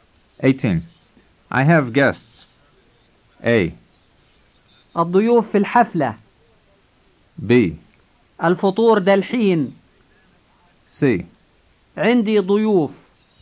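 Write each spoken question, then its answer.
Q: I have guests.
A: C: عندي ضيوف.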